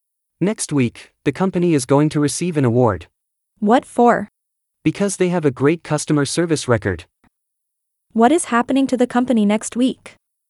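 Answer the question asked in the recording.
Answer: It is going to receive an award.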